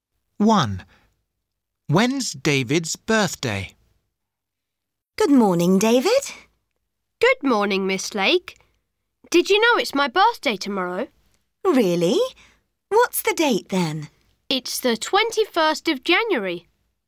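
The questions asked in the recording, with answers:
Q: When's David's birthday?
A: The 21st of January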